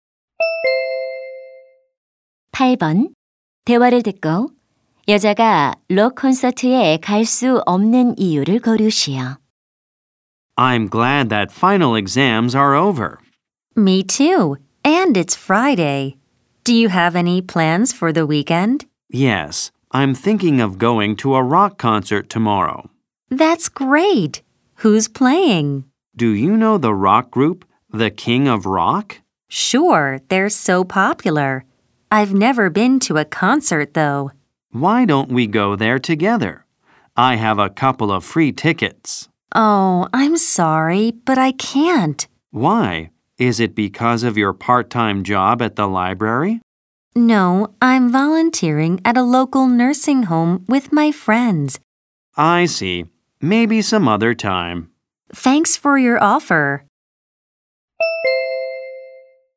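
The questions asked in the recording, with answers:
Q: 대화를 듣고 여자가 록 콘서트에 갈 수 없는 이유를 고르시오.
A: 지역 요양원에서 친구들과 자원봉사를 해야 해서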